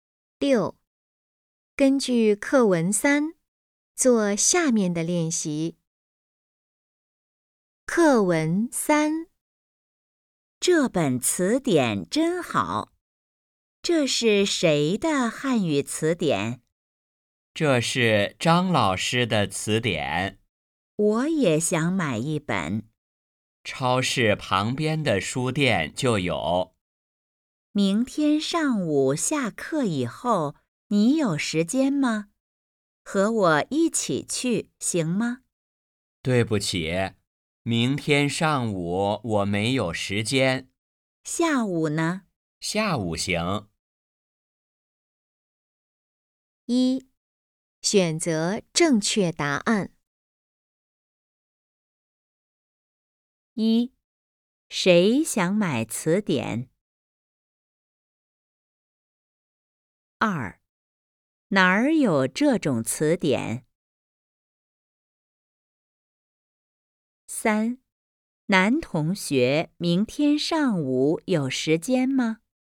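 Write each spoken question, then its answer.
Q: 哪儿有这种词典?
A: 超市旁边的书店

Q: 男同学明天上午有时间吗?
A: 没有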